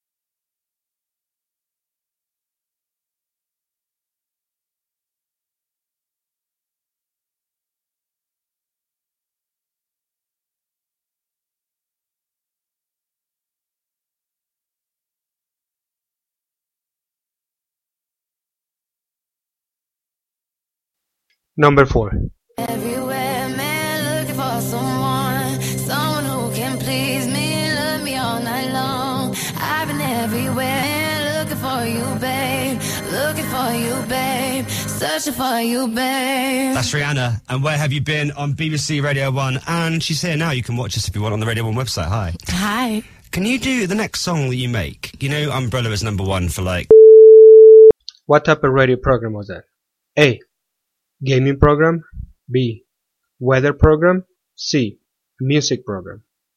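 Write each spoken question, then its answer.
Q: What type of radio program was that?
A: C: Music program.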